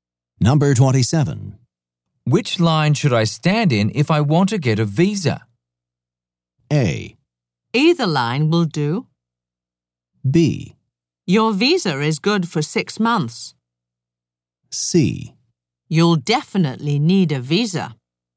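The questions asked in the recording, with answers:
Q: Which line should I stand in if I want to get a visa?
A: A: Either line will do.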